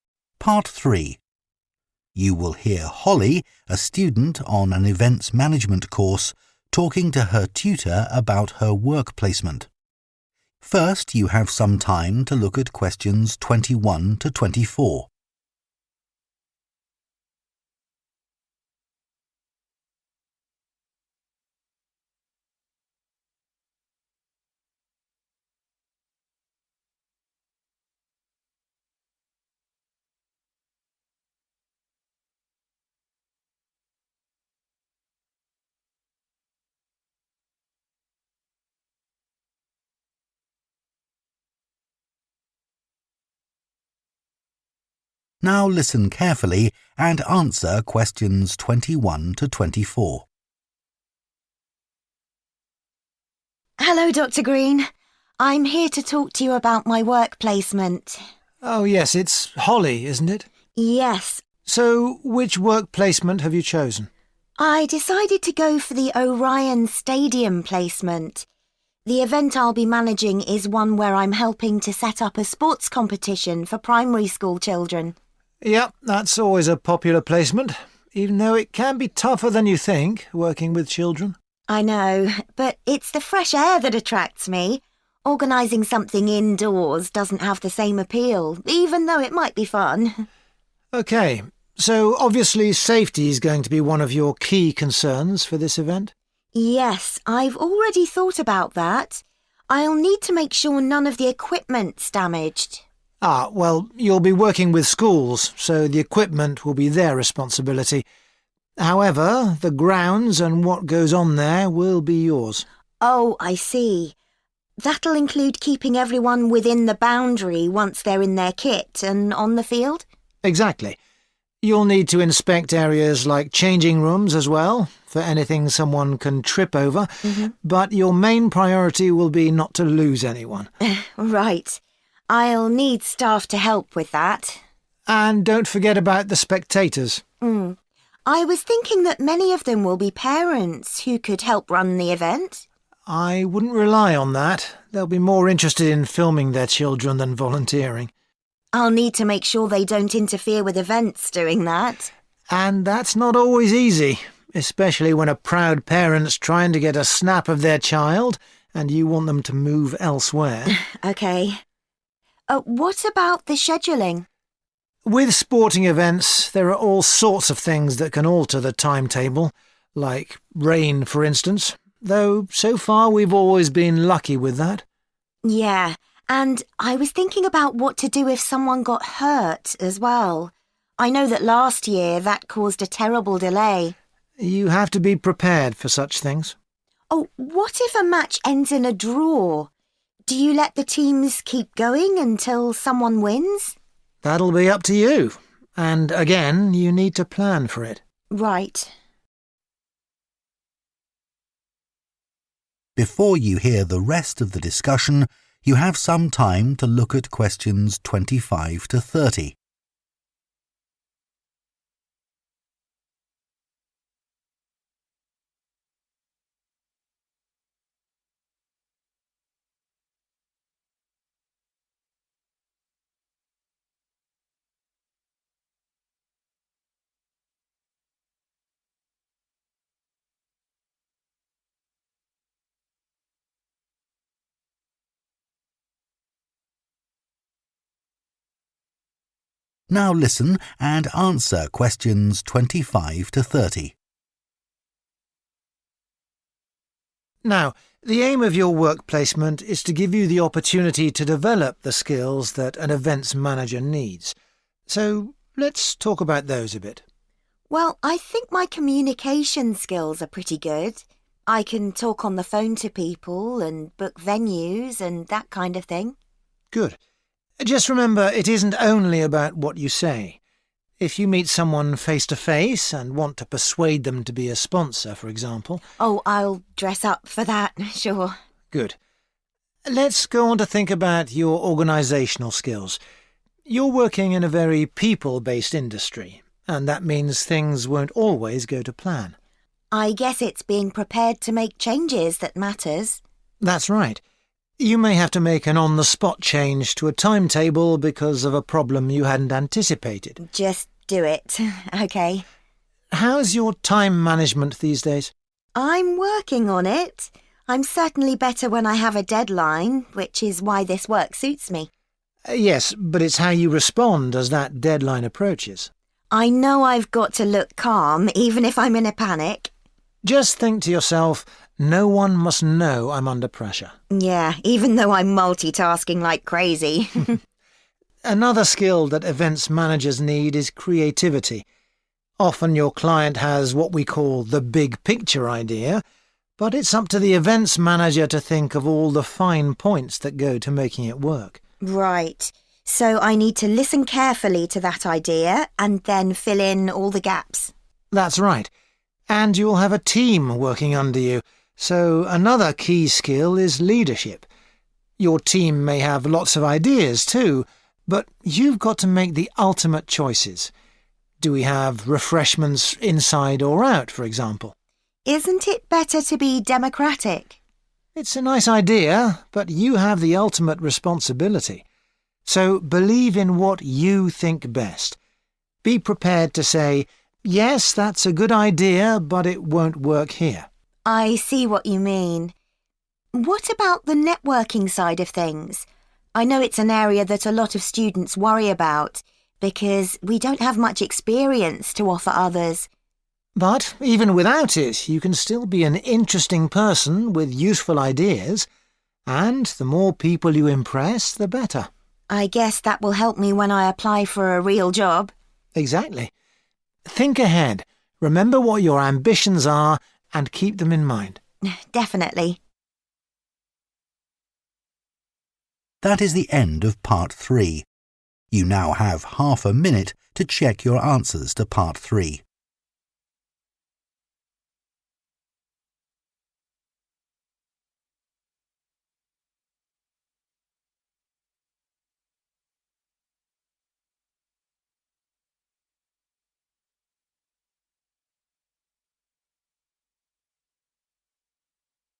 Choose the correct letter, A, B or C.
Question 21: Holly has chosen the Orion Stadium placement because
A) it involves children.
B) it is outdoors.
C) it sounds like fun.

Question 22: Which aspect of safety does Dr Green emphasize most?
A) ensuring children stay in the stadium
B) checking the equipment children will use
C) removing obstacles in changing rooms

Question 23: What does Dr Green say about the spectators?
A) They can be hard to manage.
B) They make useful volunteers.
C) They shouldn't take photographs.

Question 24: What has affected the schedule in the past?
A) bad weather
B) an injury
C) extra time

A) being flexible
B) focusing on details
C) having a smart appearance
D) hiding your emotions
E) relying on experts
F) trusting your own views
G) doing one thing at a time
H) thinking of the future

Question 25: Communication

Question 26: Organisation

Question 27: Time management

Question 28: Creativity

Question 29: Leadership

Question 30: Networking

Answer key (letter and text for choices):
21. B) it is outdoors.
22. A) ensuring children stay in the stadium
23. A) They can be hard to manage.
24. B) an injury
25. C) having a smart appearance
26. A) being flexible
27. D) hiding your emotions
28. B) focusing on details
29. F) trusting your own views
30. H) thinking of the future